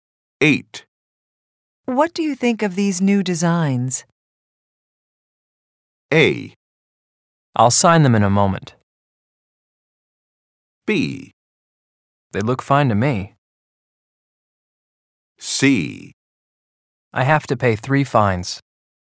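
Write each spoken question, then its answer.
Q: What do you think of these new designs?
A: B: They look fine to me.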